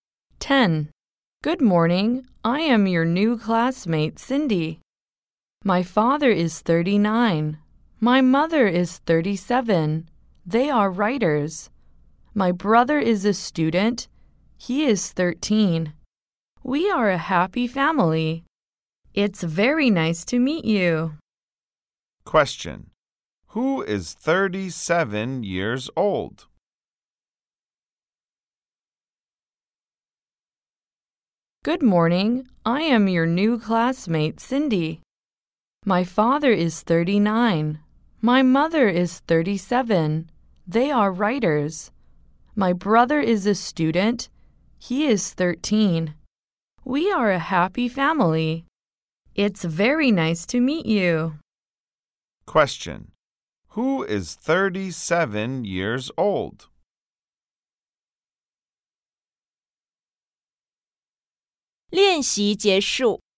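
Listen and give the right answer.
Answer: Cindy's mother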